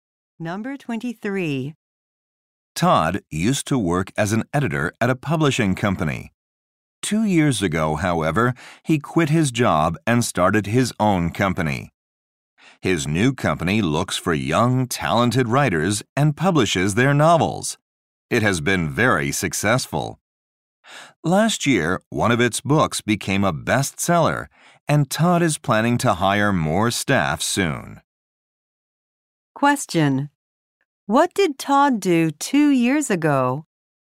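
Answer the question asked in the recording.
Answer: He quit his job and started his own company.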